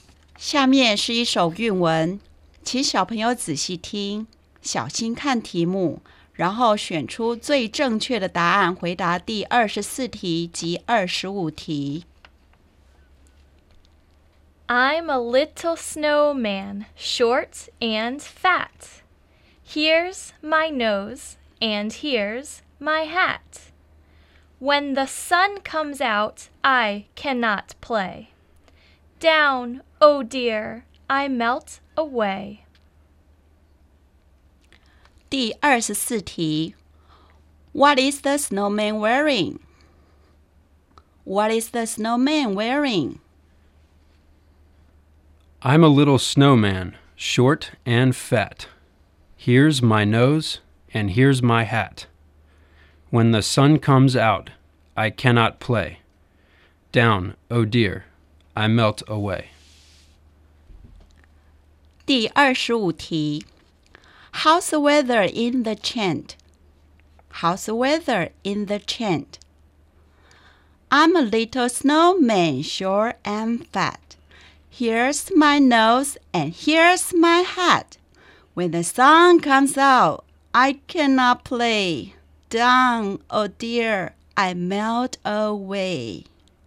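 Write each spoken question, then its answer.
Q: What is the snowman wearing?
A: A hat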